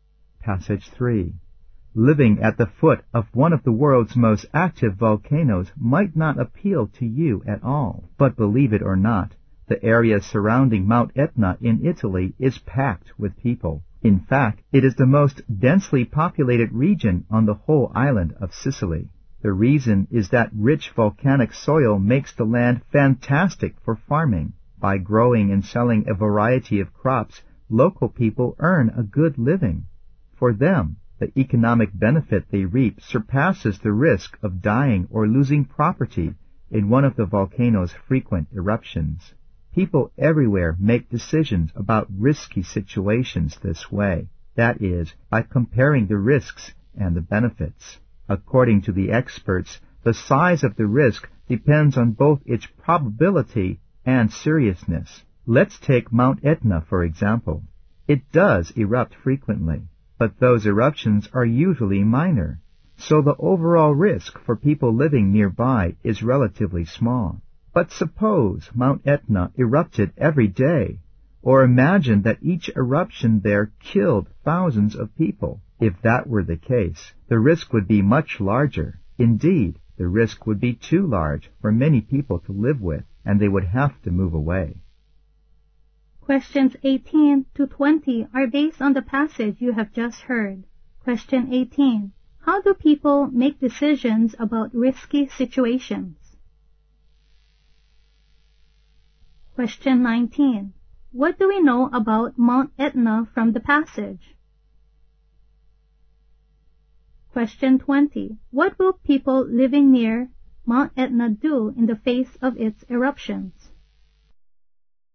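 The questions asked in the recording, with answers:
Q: How do people make decisions about risky situations?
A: By comparing the risks and the benefits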